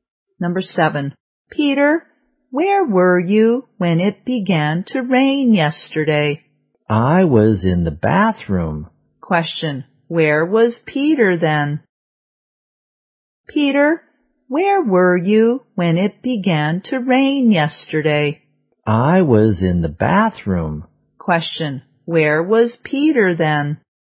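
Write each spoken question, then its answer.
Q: where was Peter then?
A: In the bathroom.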